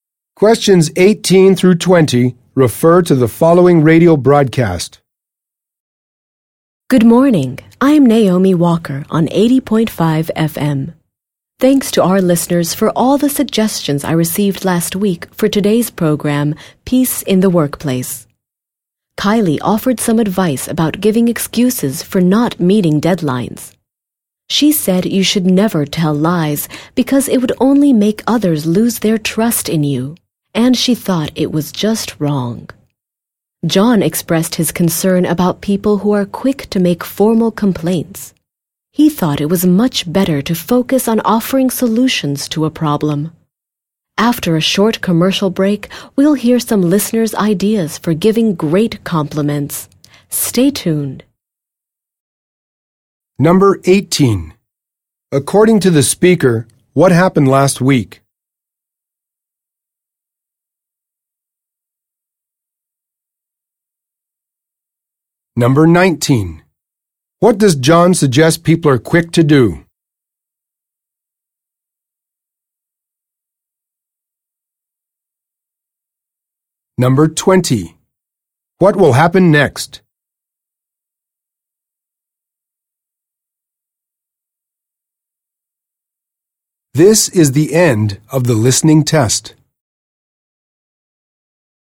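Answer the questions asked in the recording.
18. Listeners sent suggestions for the program
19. Make formal complaints
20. A commercial break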